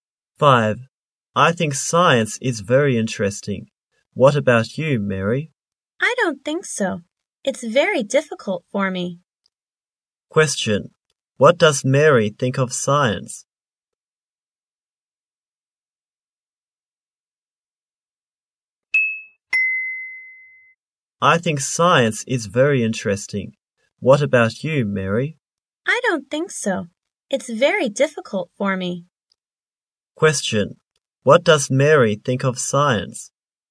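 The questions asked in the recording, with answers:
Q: Question. What does Mary think of science?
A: It's very difficult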